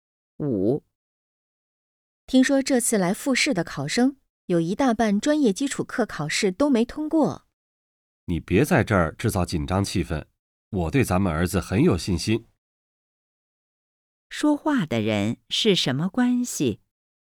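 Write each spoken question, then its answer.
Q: 说话的人是什么关系?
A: 夫妻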